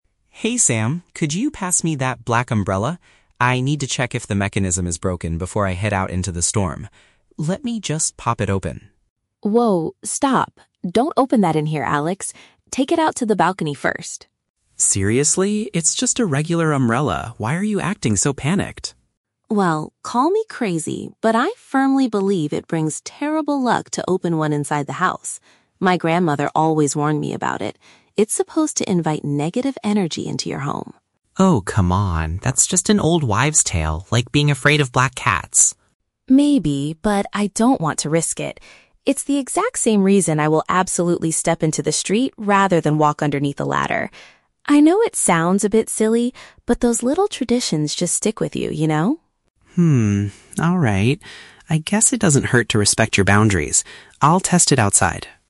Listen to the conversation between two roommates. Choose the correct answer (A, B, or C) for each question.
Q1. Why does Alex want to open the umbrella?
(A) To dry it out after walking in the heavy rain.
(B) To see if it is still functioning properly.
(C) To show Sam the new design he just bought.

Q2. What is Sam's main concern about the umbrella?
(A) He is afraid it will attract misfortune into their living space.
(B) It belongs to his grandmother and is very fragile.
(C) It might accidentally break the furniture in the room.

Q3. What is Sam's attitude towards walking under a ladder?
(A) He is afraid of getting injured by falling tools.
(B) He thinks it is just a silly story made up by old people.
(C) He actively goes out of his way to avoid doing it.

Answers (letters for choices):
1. B
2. A
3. C

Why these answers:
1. Alex says he needs to "check if the mechanism is broken", which means he wants to see if it is functioning properly. Option (A) is a trap; Alex mentions heading out into the storm (rain), but he hasn't gone out yet, so he isn't drying it. Option (C) is plausible but never mentioned.
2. Sam says it brings "terrible luck" and will "invite negative energy into your home" (attract misfortune). Option (B) is a trap; Sam mentions his "grandmother", but only because she warned him about the superstition, not because she owns it. Option (C) is a logical fear for opening an umbrella indoors, but it is not the superstitious reason Sam gives.
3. Sam says he will "step into the street rather than walk underneath a ladder", meaning he actively avoids it. Option (B) is a trap; Alex is the one who thinks these things are "old wives' tales" (silly stories), not Sam. Option (A) is a plausible real-world danger, but not mentioned in the audio.

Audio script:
Alex: Hey Sam, could you pass me that black umbrella? I need to check if the mechanism is broken before I head out into the storm. Let me just pop it open...
Sam: Whoa, stop! Don't open that in here, Alex! Take it out to the balcony first.
Alex: Seriously? It's just a regular umbrella. Why are you acting so panicked?
Sam: Well, call me crazy, but I firmly believe it brings terrible luck to open one inside the house. My grandmother always warned me about it. It's supposed to invite negative energy into your home.
Alex: Oh, come on. That's just an old wives' tale, like being afraid of black cats.
Sam: Maybe, but I don't want to risk it. It's the exact same reason I will absolutely step into the street rather than walk underneath a ladder. I know it sounds a bit silly, but those little traditions just stick with you, you know?
I guess it doesn't hurt to respect your boundaries. I'll test it outside.